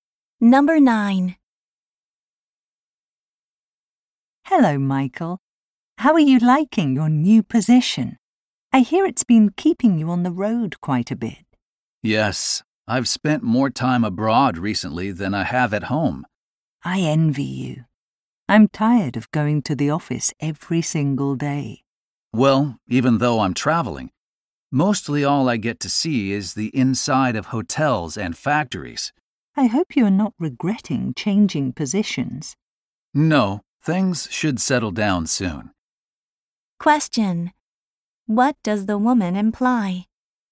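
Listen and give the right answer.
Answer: She is tired of going to the office every day and envies his travel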